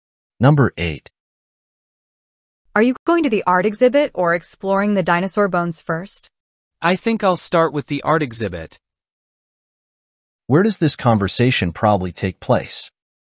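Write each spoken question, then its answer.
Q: Where does this conversation probably take place?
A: In a museum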